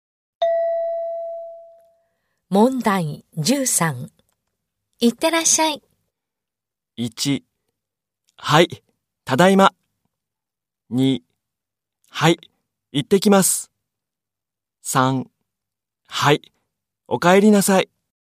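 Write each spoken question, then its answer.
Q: いってらっしゃい。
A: 2: はい、行ってきます。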